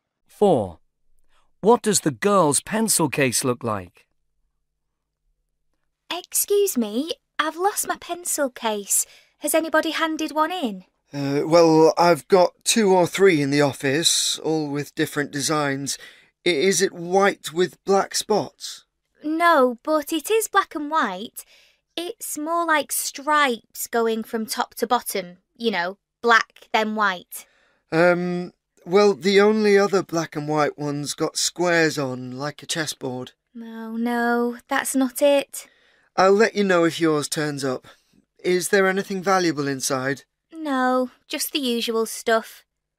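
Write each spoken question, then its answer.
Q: What does the girl's pencil case look like?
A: Black and white with vertical stripes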